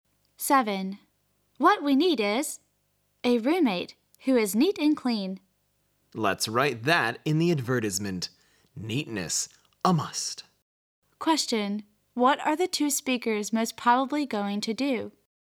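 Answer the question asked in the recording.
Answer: Write an advertisement for a roommate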